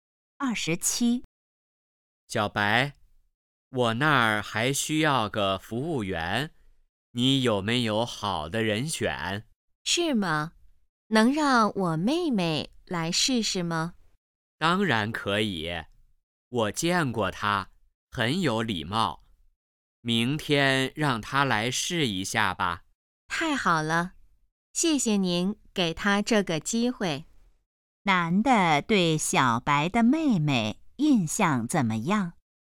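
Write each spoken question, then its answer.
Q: 男的对小白的妹妹印象怎么样?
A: 很有礼貌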